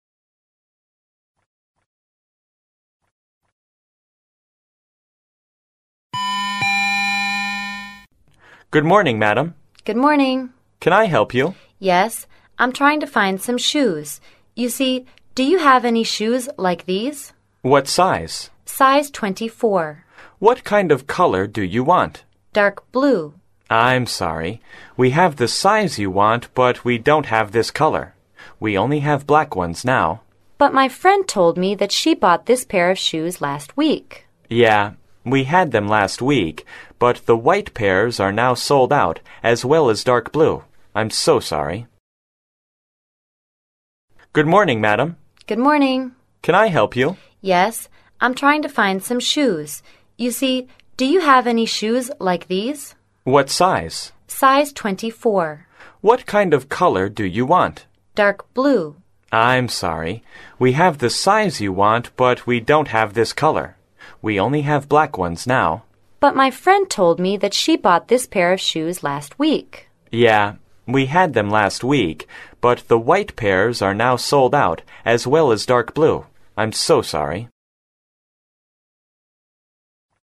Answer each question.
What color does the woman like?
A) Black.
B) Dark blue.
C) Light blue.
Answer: B

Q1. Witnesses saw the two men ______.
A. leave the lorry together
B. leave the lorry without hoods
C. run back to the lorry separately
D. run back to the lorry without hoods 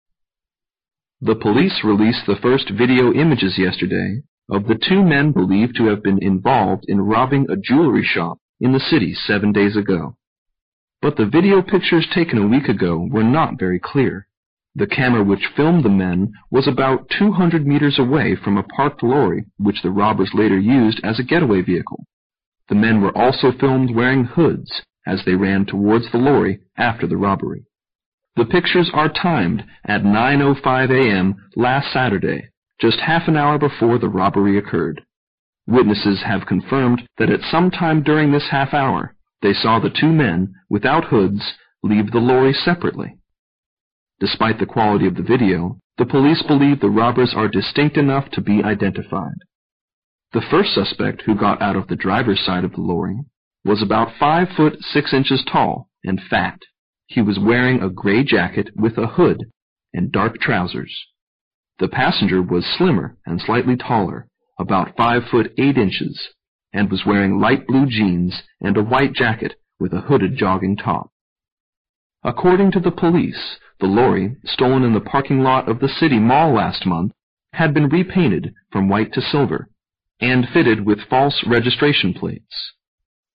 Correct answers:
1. B

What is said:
[听力原文] The police released the first video images yesterday of the two men believed to have been involved in robbing a jewelry shop in the city seven days ago. But the video pictures taken a week ago were not very clear. The camera which filmed the men was about 200 meters away from a parked lorry which the robbers later used as a get-away vehicle. The men were also filmed wearing hoods as they ran towards the lorry after the robbery. The pictures are timed at 9:05 a.m. last Saturday, just half an hour before the robbery occurred. Witnesses have confirmed that at some time during this half hour, they saw the two men without hoods leave the lorry separately. Despite the quality of the video, the police believe the robbers are distinct enough to be identified. The first suspect who got out of the driver side of the lorry was about 5 foot 6 inches tall and fat. He was wearing a grey jacket with a hood and dark trousers. The passenger was slimmer and slightly taller, about 5 foot 8 inches and was wearing light blue jeans and a white jacket with a hooded jogging top. According to the police, the lorry stored in the parking lot of the city mall last month had been repainted from white to silver and faded with false registration plates.

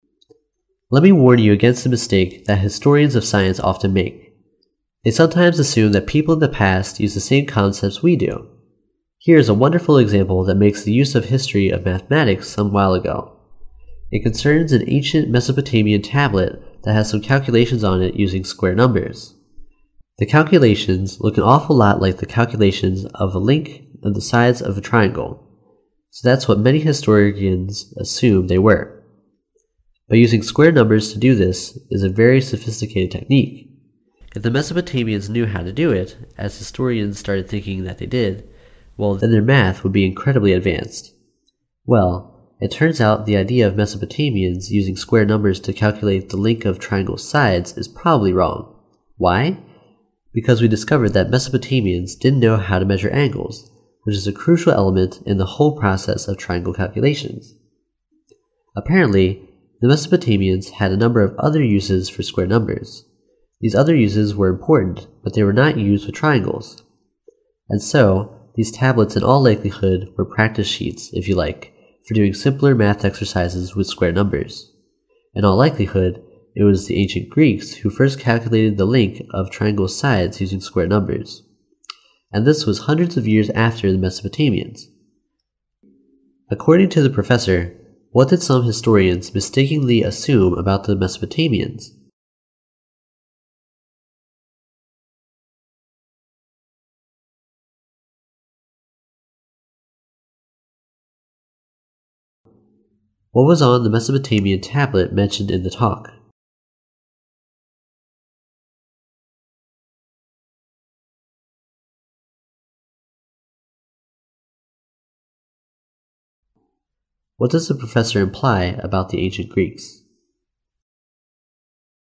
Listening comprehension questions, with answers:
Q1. What was on the Mesopotamian tablet mentioned in the talk?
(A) Pictures of triangles.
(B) Calculations using square numbers.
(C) Measurements of angles.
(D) Greek symbols.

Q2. What does the professor imply about the ancient Greeks?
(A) They taught the Mesopotamians about square numbers.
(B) They were less advanced in mathematics than the Mesopotamians.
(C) They did not use square numbers.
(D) They knew how to measure angles.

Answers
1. B
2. D

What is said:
[听力原文] Let me warn you against a mistake that historians of science often make. They sometimes assume that people in the past use the same concepts we do. Here is a wonderful example that makes the use of history of mathematics some while ago. It concerns an ancient Mesopotamian tablet that has some calculations on it using square numbers. The calculations look an awful one like the calculations of the link of the sides of triangle. So that's what many historians assume they were. But using square numbers to do this is a very sophisticated technique. If the Mesopotamians knew how to do it, as historians started thinking that they did. Well, they learn math with incredibly advanced. Well, it turns out the idea of Mesopotamians use square numbers to calculate the link of triangle's sides is probably wrong. Why? Because we discovered that Mesopotamians didn't know how to measure angles, which is a crucial element in the whole process of triangle calculations. Apparently the Mesopotamians had a number of other uses for square numbers. These other uses were important but they were not used with triangles. And so these tablets in all likelihood were practice sheets, if you like, for doing simpler math exercises with square numbers. In all likelihood, it was the ancient Greeks who first calculate the link of triangle's sides using square numbers. And this was hundreds of years after the Mesopotamians.
According to the professor, what did some historians mistakenly assumed about the Mesopotamians?
根据The calculations look an awful one like the calculations of the link of the sides of triangle.
[听力原文] What was on the Mesopotamian tablet mentioned in the talk?
[听力原文] What does the professor imply about the ancient Greeks?

